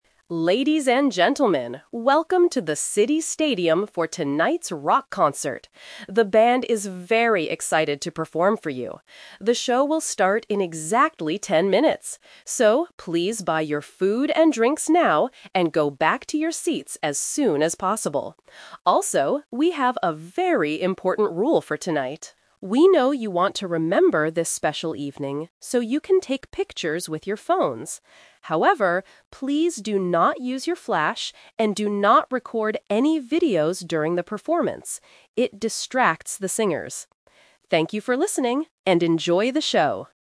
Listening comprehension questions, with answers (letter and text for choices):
Listen to the announcement at a stadium. Choose the correct answer (A, B, or C) for each question.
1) When will the concert begin?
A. In ten minutes.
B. In an hour.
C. Right now.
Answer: A. In ten minutes.

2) What does the announcer ask the audience to do before the show?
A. Go outside to buy food.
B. Return to their seats.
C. Stand up and dance.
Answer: B. Return to their seats.

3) What is the rule about using mobile phones tonight?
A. People cannot take any pictures.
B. People can record videos of the band.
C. People can take pictures but without the flash.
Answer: C. People can take pictures but without the flash.

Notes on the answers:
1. The announcer says clearly: "The show will start in exactly ten minutes." Option (B) is a distractor with an unmentioned time. Option (C) is a trap because the announcer tells them to buy drinks "now", but the show itself does not start immediately.
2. The announcer instructs the crowd to "go back to your seats as soon as possible." ("Return" is a simple A2 paraphrase for "go back"). Option (A) is a trap; they are told to buy food, but they don't need to go outside the stadium to do it. Option (C) is what people usually do at a rock concert, but it is not what they are instructed to do right now.
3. This is the main A2 rule trap. The announcer says, "...you can take pictures with your phones. However, please do not use your flash..." Option (A) is incorrect because taking pictures is allowed. Option (B) is also a trap because the announcer explicitly says, "...and do not record any videos during the performance."

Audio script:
Announcer: Ladies and gentlemen, welcome to the City Stadium for tonight's rock concert! The band is very excited to perform for you. The show will start in exactly ten minutes. So, please buy your food and drinks now, and go back to your seats as soon as possible. Also, we have a very important rule for tonight. We know you want to remember this special evening, so you can take pictures with your phones. However, please do not use your flash, and do not record any videos during the performance.